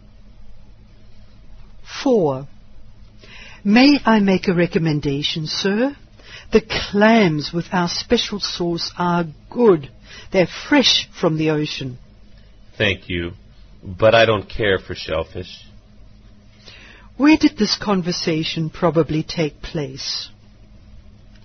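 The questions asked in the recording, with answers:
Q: Where did this conversation probably take place?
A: In a restaurant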